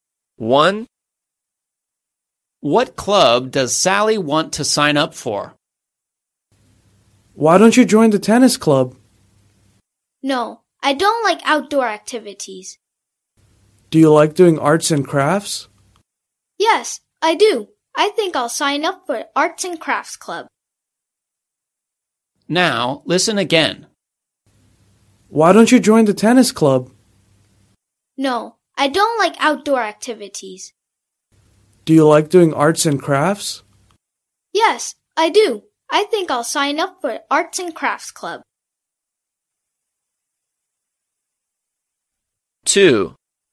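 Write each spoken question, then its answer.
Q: What club does Sally want to sign up for?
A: Arts and Crafts Club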